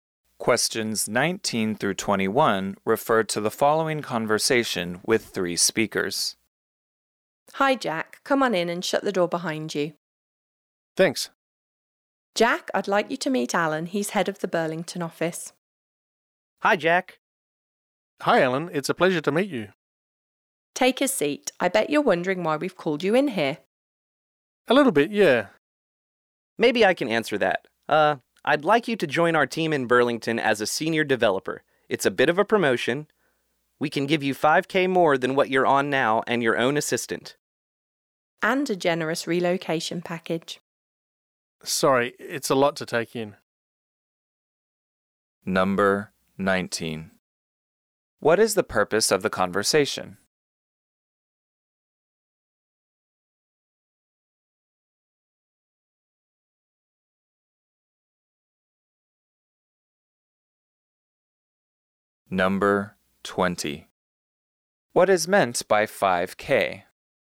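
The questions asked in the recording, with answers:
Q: What is the purpose of the conversation?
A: To offer Jack a promotion to senior developer in the Burlington office

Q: What is meant by 5K?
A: $5,000 more in salary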